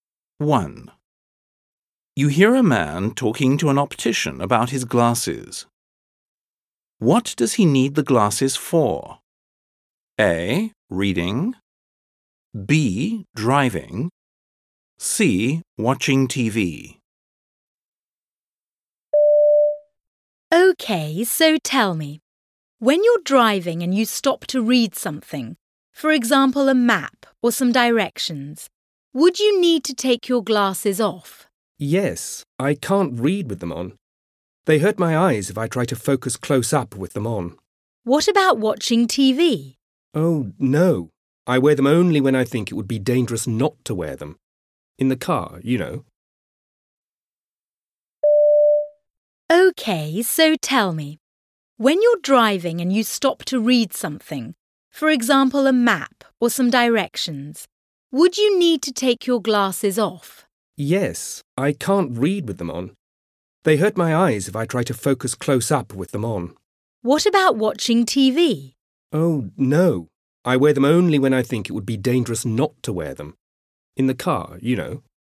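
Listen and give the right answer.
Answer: B: Driving.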